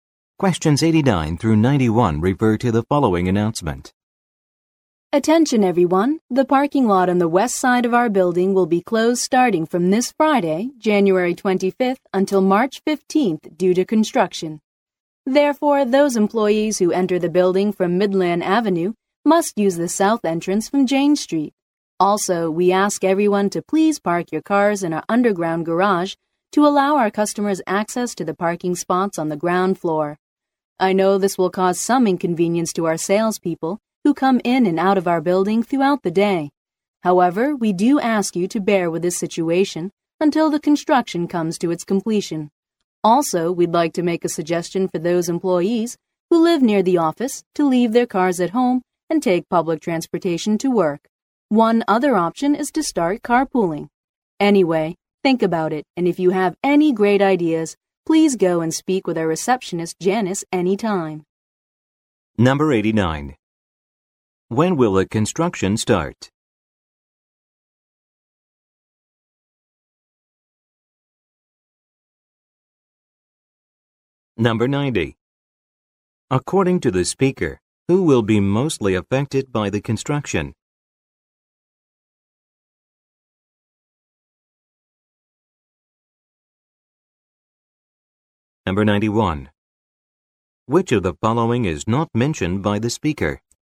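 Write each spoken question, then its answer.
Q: When will the construction start?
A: This Friday, January 25th

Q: According to the speaker, who will be mostly affected by the construction?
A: The salespeople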